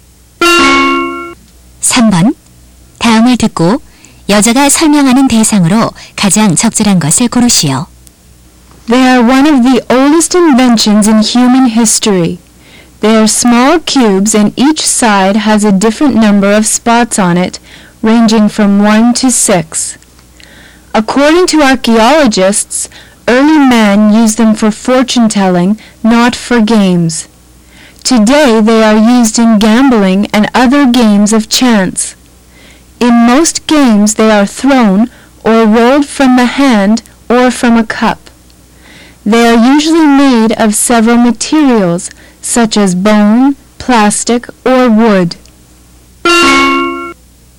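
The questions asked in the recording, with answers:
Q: 다음을 듣고 여자가 설명하는 대상으로 가장 적절한 것을 고르시오.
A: 주사위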